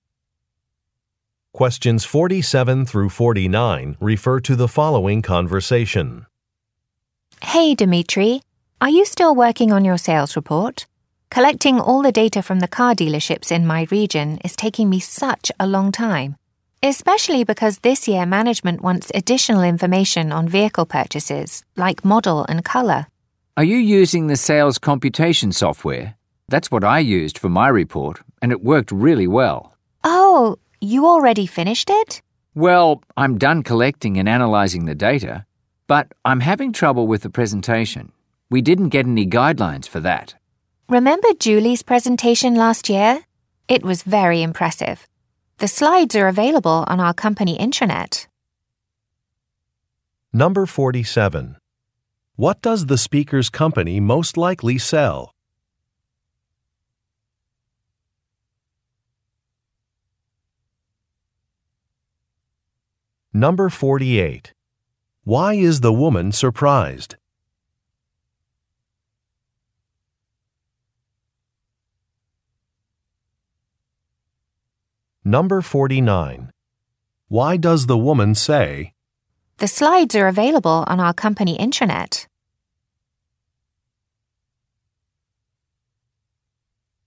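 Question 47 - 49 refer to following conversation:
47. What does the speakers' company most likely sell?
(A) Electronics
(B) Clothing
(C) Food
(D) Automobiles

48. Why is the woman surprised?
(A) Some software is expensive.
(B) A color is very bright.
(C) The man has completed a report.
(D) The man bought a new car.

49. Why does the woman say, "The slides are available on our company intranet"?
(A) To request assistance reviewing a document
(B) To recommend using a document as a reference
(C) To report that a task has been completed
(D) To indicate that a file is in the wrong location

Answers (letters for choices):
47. D
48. C
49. B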